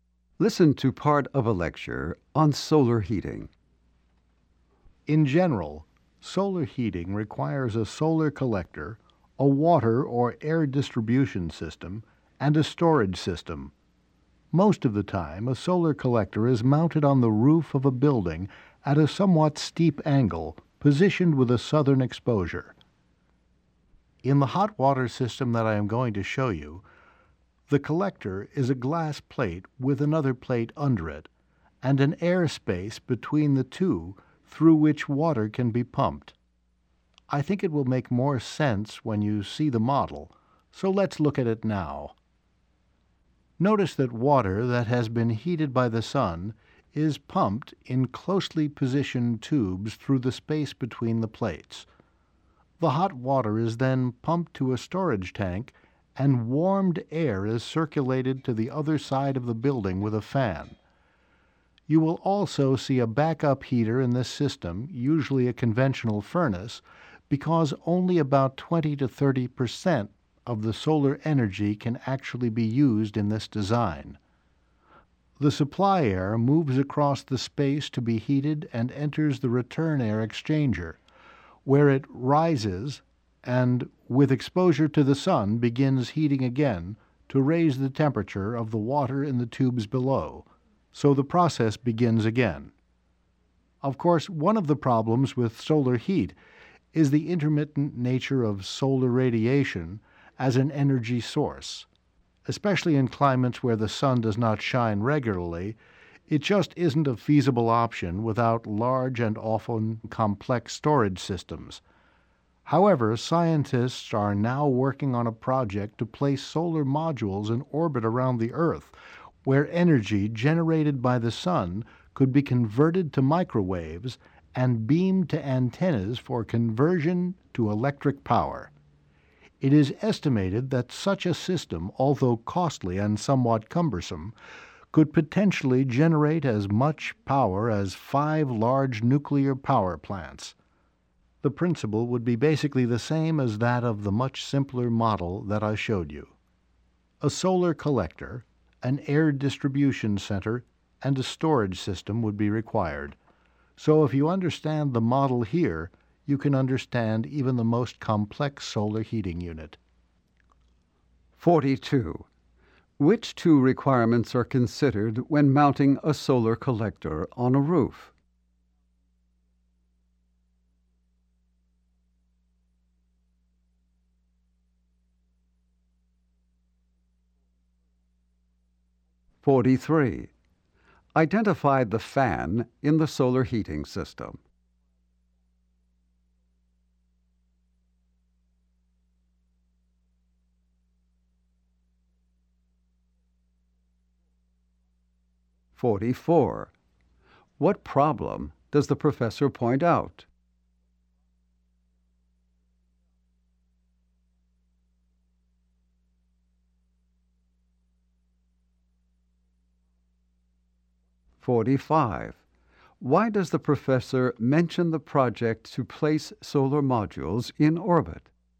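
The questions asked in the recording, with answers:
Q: What problem does the professor point out?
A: Solar radiation is intermittent as an energy source

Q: Why does the professor mention the project to place solar modules in orbit?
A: To show that complex systems work on the same principle as the simple model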